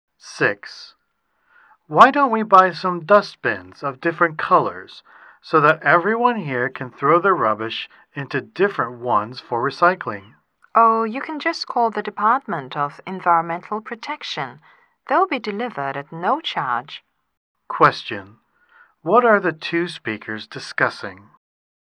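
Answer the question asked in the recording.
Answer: Getting dustbins of different colors for sorting rubbish for recycling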